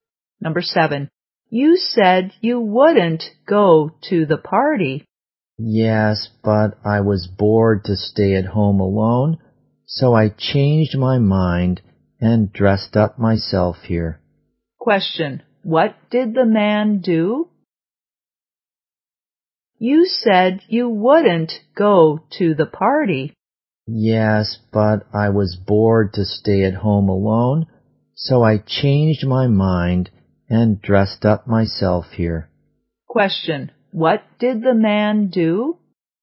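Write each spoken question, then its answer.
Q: What did the man do?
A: He changed his mind and went to the party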